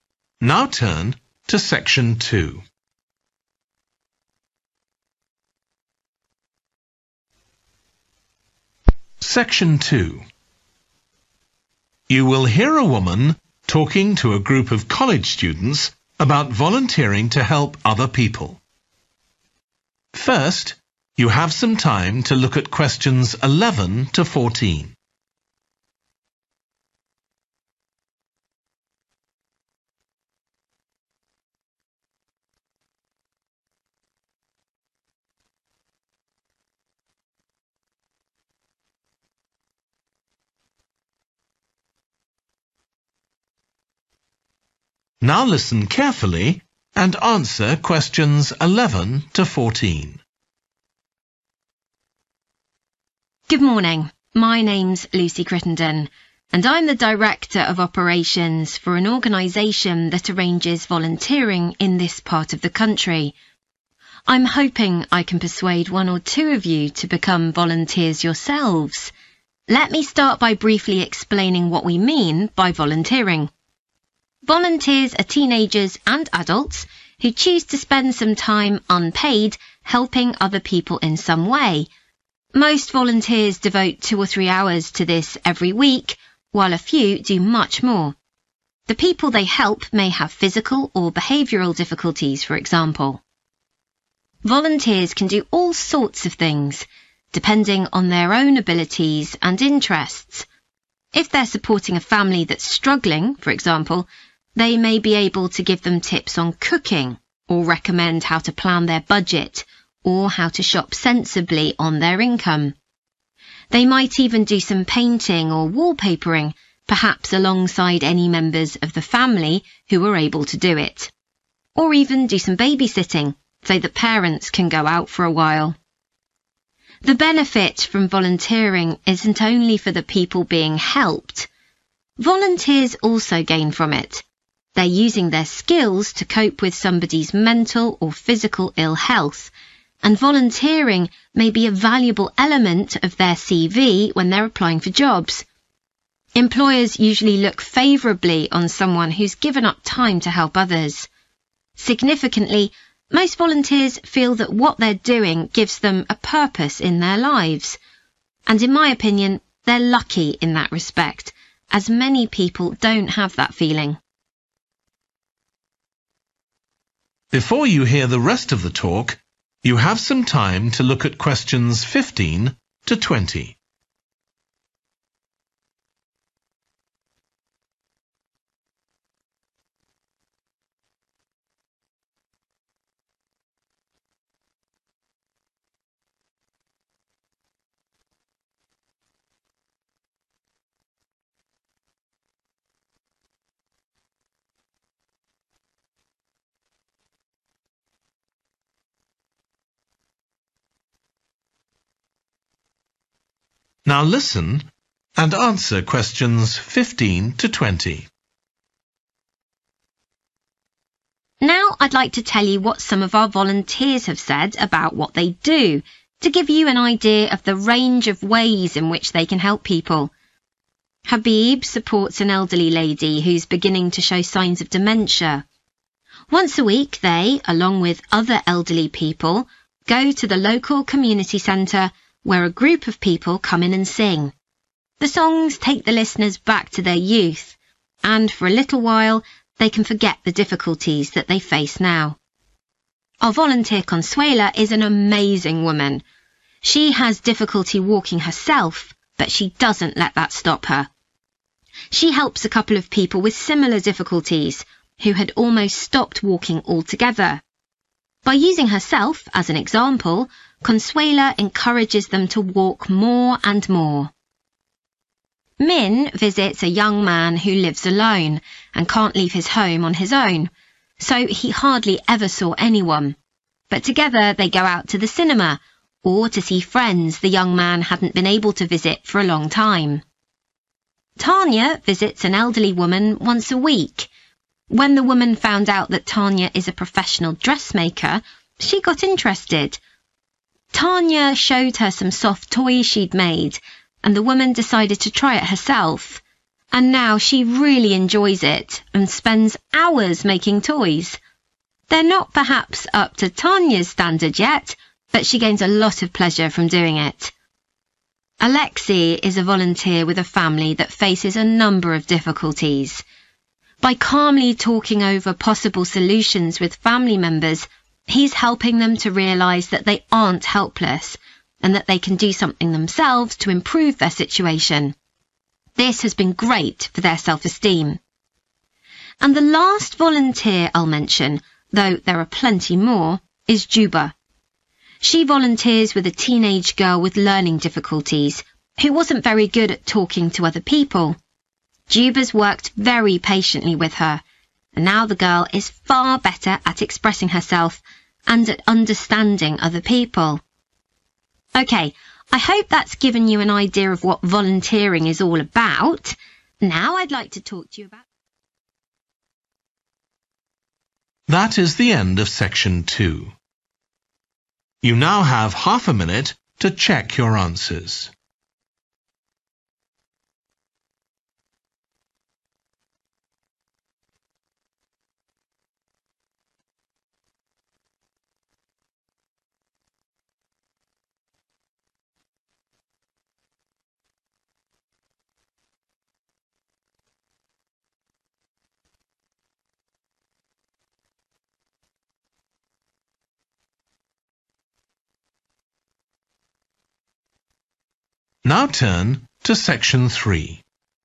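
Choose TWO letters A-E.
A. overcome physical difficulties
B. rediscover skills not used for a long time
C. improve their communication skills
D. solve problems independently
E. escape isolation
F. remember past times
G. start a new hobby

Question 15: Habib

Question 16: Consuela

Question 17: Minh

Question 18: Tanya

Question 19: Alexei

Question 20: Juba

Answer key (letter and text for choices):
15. F. remember past times
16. A. overcome physical difficulties
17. E. escape isolation
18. G. start a new hobby
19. D. solve problems independently
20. C. improve their communication skills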